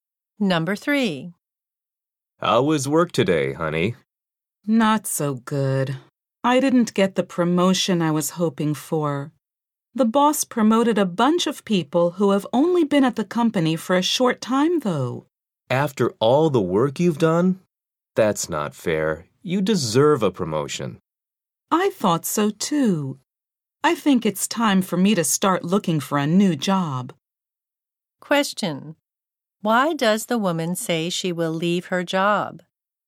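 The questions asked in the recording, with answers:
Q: Why does the woman say she will leave her job?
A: She did not get the promotion she hoped for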